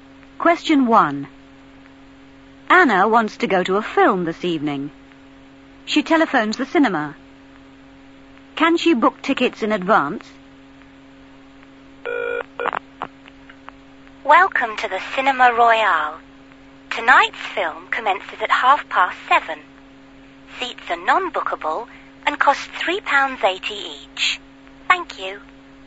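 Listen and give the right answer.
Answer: No, seats are non-bookable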